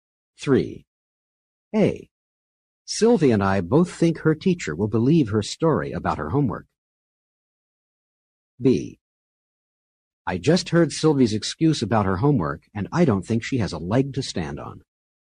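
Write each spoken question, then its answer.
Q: A. Sylvie and I both think her teacher will believe her story about her homework.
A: different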